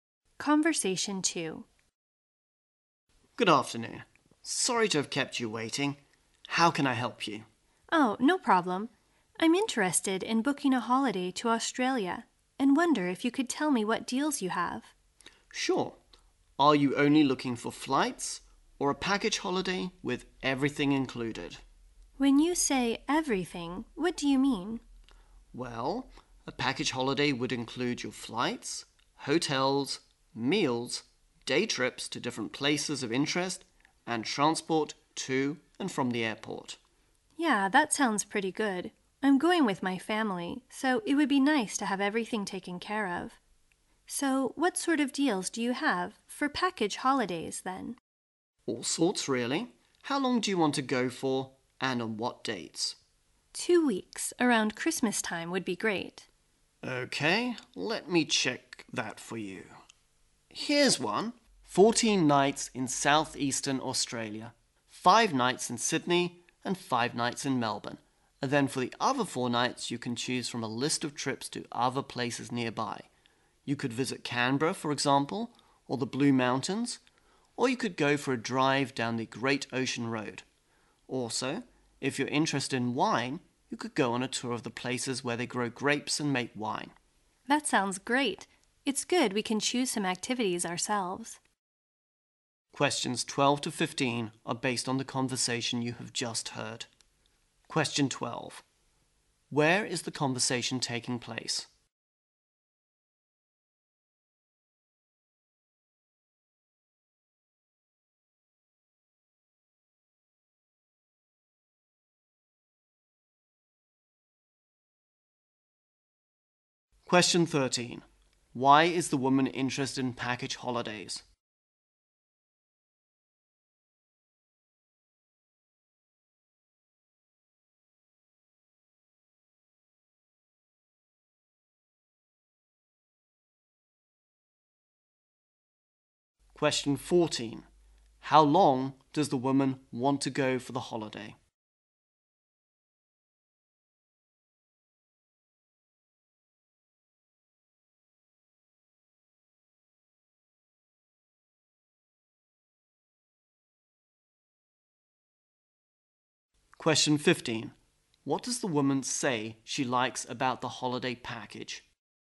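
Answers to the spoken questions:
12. At a travel agency
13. She's going with her family and wants everything taken care of
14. Two weeks
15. They can choose some activities themselves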